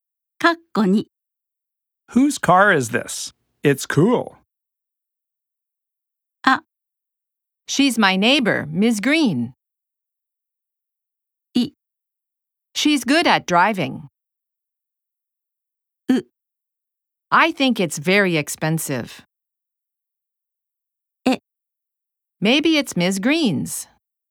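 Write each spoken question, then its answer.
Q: Whose car is this? It's cool.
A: え: Maybe it's Ms. Green's.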